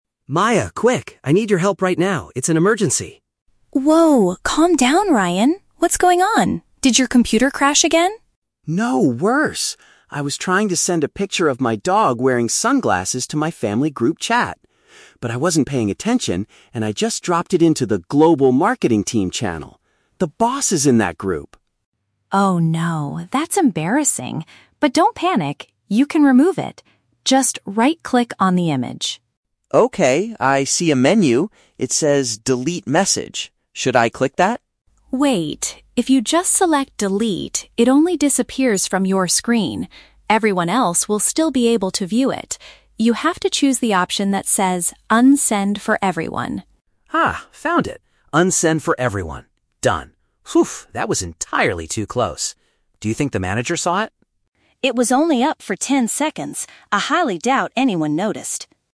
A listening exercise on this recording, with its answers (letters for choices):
Listen to a conversation between two colleagues. For each question, choose the correct answer (A, B, or C).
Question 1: What is Ryan's main problem?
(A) His work computer suddenly stopped working.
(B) He shared a private image in a professional channel.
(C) He lost an important document for the marketing team.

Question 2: What was the content of the mistakenly sent file?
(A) A funny photograph of his pet.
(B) A picture of his family members.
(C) A screenshot of a private conversation.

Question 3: Why does Maya warn Ryan NOT to click the first "Delete" option?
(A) Because it will completely erase the whole group chat history.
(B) Because he needs to ask the manager for permission first.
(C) Because his coworkers would still be able to look at the picture.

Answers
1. B
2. A
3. C

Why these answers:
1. Ryan says he accidentally dropped a picture into the "Global Marketing Team" channel (a professional channel). Option (A) is a trap; Maya asks "Did your computer crash again?" but Ryan immediately says "No, worse!". Option (C) is plausible in an office but never mentioned.
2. Ryan states he sent "a picture of my dog wearing sunglasses" (a funny photograph of his pet). Option (B) is a trap; he intended to send it to his "family group chat", but the picture itself is not of his family members. Option (C) is not mentioned.
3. Maya explains that if he clicks the normal Delete, "Everyone else will still be able to view it," meaning his coworkers would still see the picture. He must choose "Unsend for everyone" instead. Options (A) and (B) are traps that sound like plausible software warnings, but they are not the reason Maya gives.

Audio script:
Ryan: Maya, quick! I need your help right now. It's an emergency.
Maya: Whoa, calm down, Ryan. What's going on? Did your computer crash again?
Ryan: No, worse! I was trying to send a picture of my dog wearing sunglasses to my family group chat. But I wasn't paying attention, and I just dropped it into the "Global Marketing Team" channel! The boss is in that group!
Maya: Oh no. That's embarrassing. But don't panic, you can remove it. Just right-click on the image.
Ryan: Okay, I see a menu. It says "Delete message". Should I click that?
Maya: Wait! If you just select "Delete", it only disappears from your screen. Everyone else will still be able to view it. You have to choose the option that says "Unsend for everyone".
Ryan: Ah, found it! "Unsend for everyone". Done! that was entirely too close. Do you think the manager saw it?